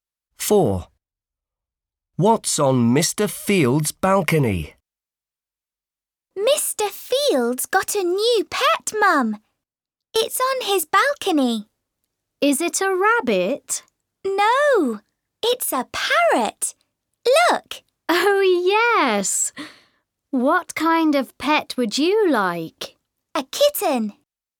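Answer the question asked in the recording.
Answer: a parrot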